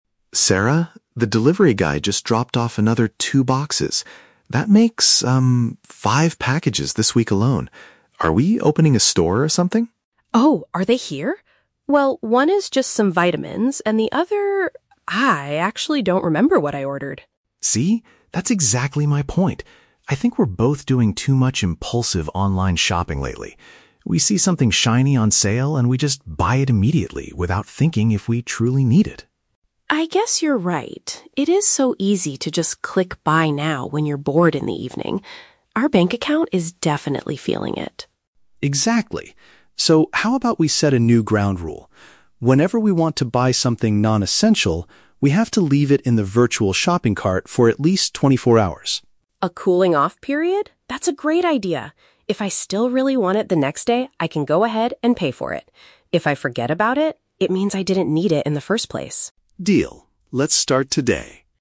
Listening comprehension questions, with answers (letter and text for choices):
Listen to a conversation between a married couple about online shopping. Choose the best answer (A, B, or C) for each question.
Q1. Why does Tom bring up the topic of online shopping at the beginning?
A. He wants to start a small retail shop with his wife.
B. He is concerned about the high number of parcels arriving at their home.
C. He needs to remind Sarah to order her health supplements.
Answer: B. He is concerned about the high number of parcels arriving at their home.

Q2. According to Tom, what is the main problem with their current shopping behavior?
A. They purchase items instantly without considering if they are actually necessary.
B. They are spending too much money on expensive evening entertainment.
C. They only shop at stores that offer huge discounts and sales.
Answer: A. They purchase items instantly without considering if they are actually necessary.

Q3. What do the couple agree to do to solve their shopping problem?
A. They will delete their credit card information from the shopping websites.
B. They will completely stop buying non-essential items from the internet.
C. They will wait a full day before finalizing the payment for unnecessary goods.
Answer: C. They will wait a full day before finalizing the payment for unnecessary goods.

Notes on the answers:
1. Tom mentions that the delivery guy dropped off "another two boxes" making it "five packages this week alone." Option B paraphrases this as being "concerned about the high number of parcels arriving."
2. Tom states the problem is that they "buy it immediately without thinking if we truly need it." Option A perfectly paraphrases this behavior as purchasing "instantly without considering if they are actually necessary."
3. Tom suggests they "leave it in the virtual shopping cart for at least 24 hours," and Sarah agrees that if she still wants it "the next day, I can go ahead and pay." Option C uses synonyms: "wait a full day" (24 hours) and "finalizing the payment" (pay for it).

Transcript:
Tom: Sarah, the delivery guy just dropped off another two boxes. That makes, um, five packages this week alone. Are we opening a store or something?
Sarah: Oh, are they here? Well, one is just some vitamins, and the other... ah, I actually don't remember what I ordered.
Tom: See? That's exactly my point. I think we're both doing too much impulsive online shopping lately. We see something shiny on sale, and we just buy it immediately without thinking if we truly need it.
Sarah: I guess you're right. It is so easy to just click "buy now" when you're bored in the evening. Our bank account is definitely feeling it.
Tom: Exactly. So, how about we set a new ground rule? Whenever we want to buy something non-essential, we have to leave it in the virtual shopping cart for at least 24 hours.
Sarah: A cooling-off period? That's a great idea. If I still really want it the next day, I can go ahead and pay for it. If I forget about it, it means I didn't need it in the first place.